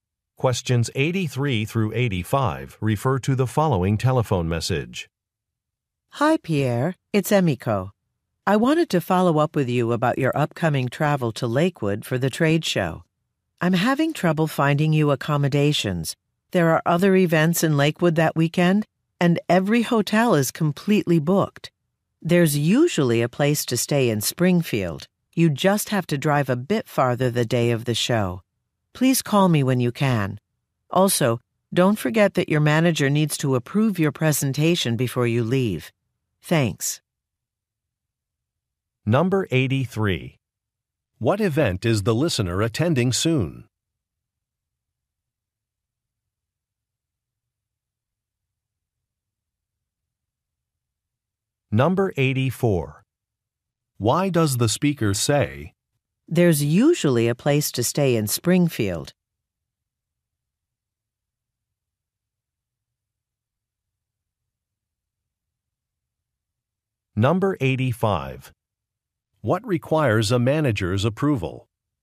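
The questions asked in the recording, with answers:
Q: What event is the listener attending soon?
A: A trade show

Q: Why does the speaker say,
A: To suggest staying in Springfield since Lakewood hotels are full

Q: What requires a manager's approval?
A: The listener's presentation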